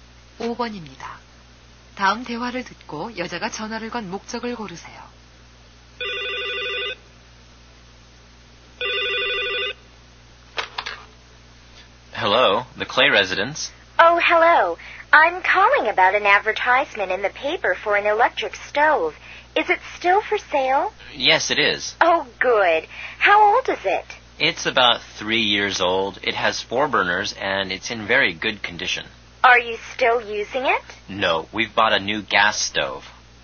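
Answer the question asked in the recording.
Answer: 광고에 나온 중고 전기레인지에 대해 문의하려고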